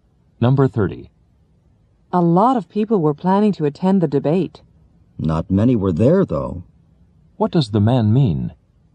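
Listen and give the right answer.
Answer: Few people attended the debate.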